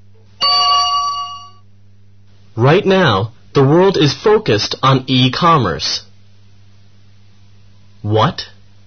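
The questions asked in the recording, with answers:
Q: What?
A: e-commerce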